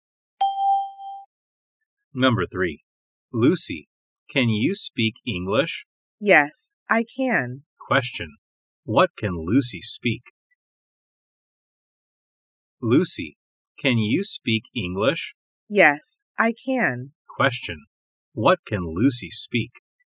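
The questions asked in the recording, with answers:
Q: What can Lucy speak?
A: English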